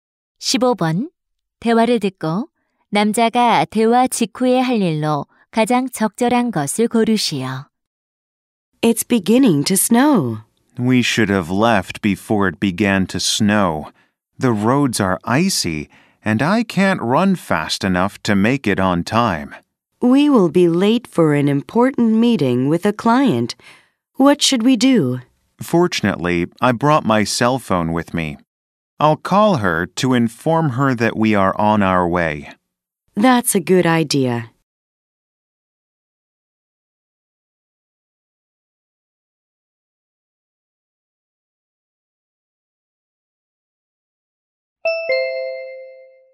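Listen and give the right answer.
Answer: 고객에게 전화하기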